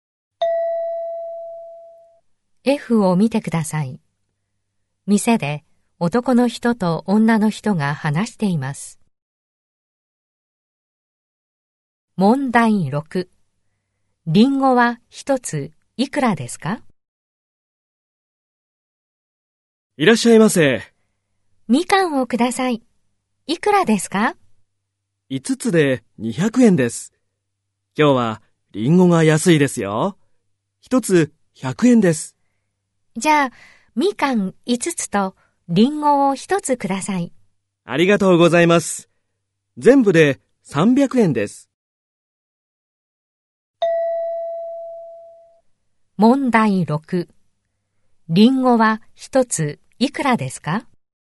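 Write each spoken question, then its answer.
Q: リンゴは1ついくらですか?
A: 100円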